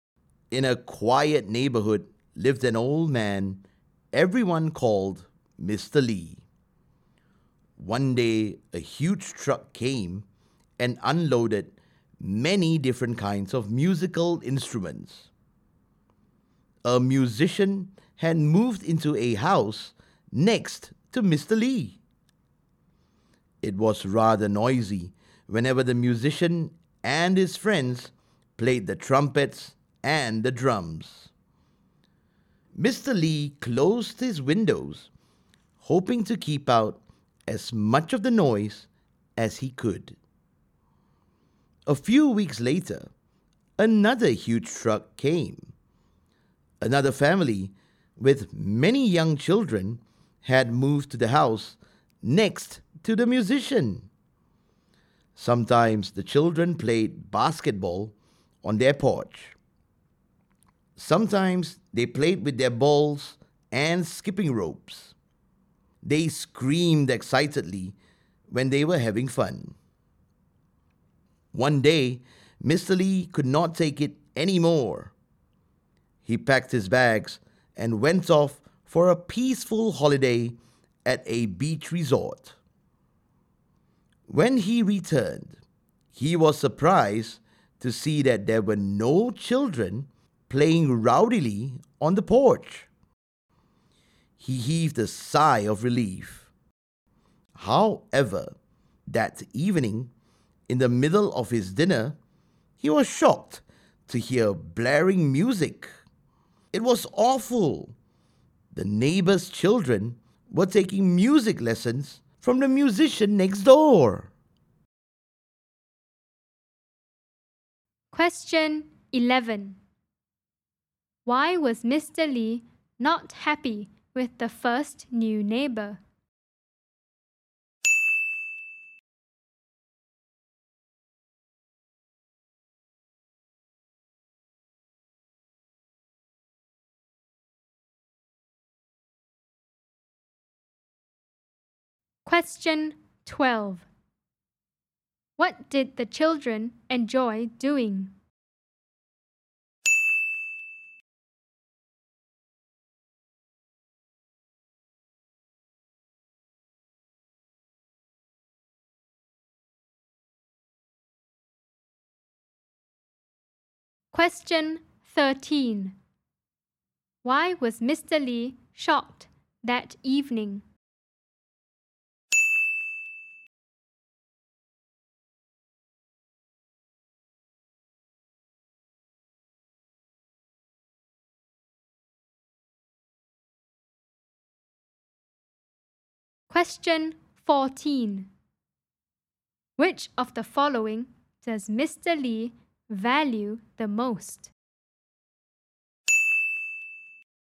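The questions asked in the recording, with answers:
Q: Why was Mr. Lee not happy with the first new neighbor?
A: The musician and his friends were noisy playing trumpets and drums

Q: What did the children enjoy doing?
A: Playing basketball, balls and skipping ropes

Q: Why was Mr. Lee shocked that evening?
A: He heard blaring music from the children's music lessons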